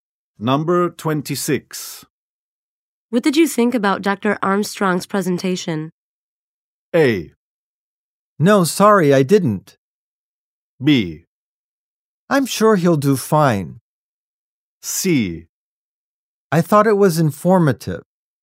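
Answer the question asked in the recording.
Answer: C: I thought it was informative.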